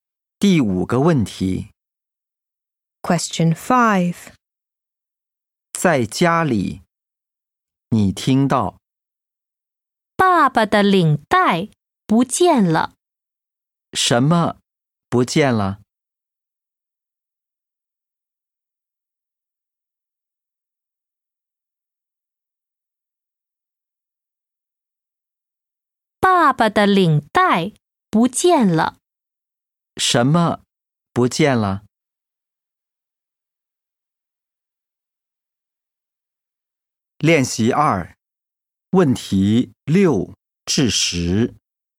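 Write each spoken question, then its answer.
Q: 什么不见了?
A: 爸爸的领带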